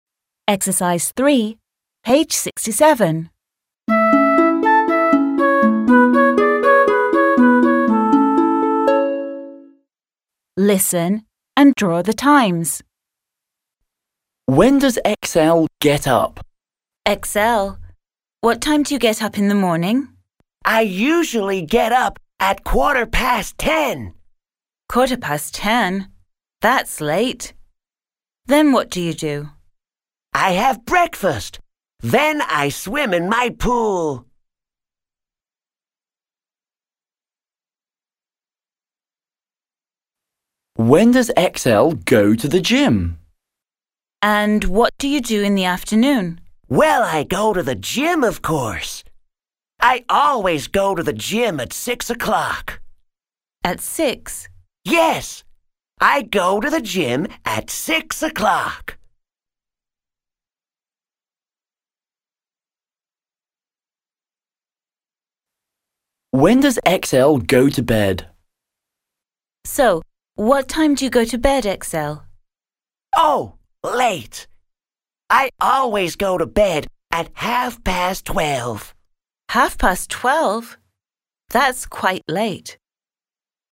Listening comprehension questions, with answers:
3. Listen and write the time in your notebook.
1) When does XL Get up?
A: At quarter past ten.

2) When does XL Go to the gym?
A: At six o'clock.

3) When does XL Go to bed?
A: At half past twelve.

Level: Starlight 4 класс